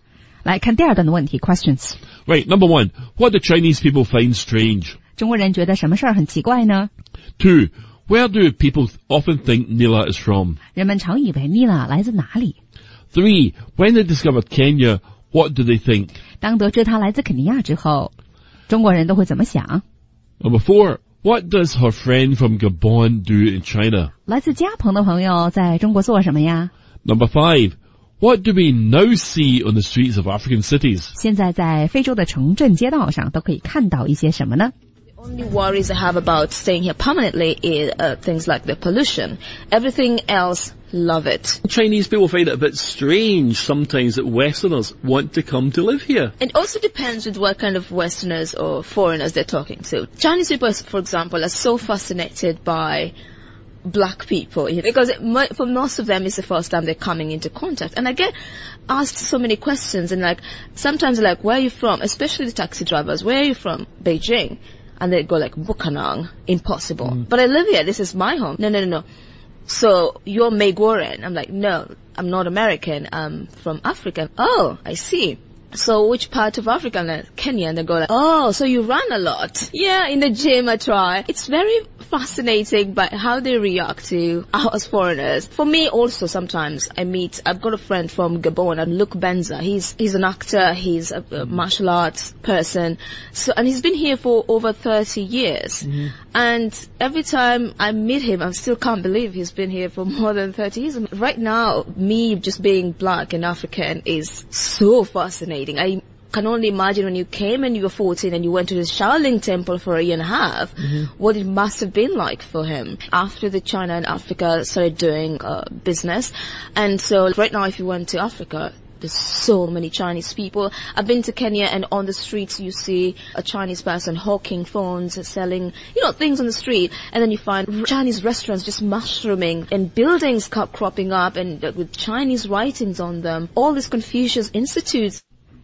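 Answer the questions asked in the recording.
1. That Westerners want to come to live in China
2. America
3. That she runs a lot
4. He is an actor and does martial arts
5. Chinese people selling phones, Chinese restaurants, buildings with Chinese writing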